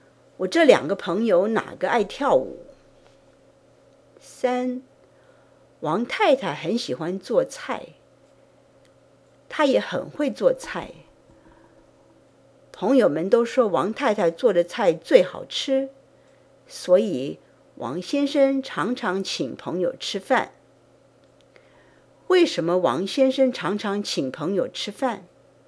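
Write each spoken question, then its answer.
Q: 为什么王先生常常请朋友吃饭?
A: 因为朋友们都说王太太做的菜最好吃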